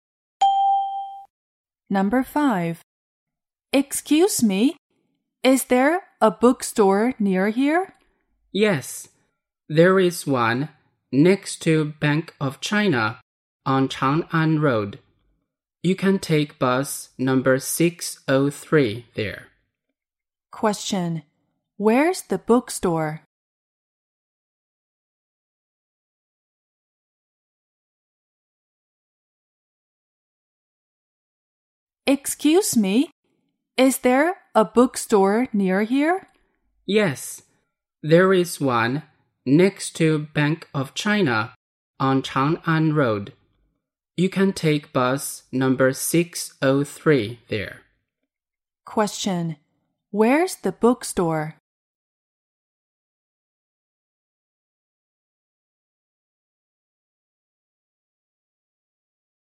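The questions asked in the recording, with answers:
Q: Where's the bookstore?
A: Next to Bank of China on Chang'an Road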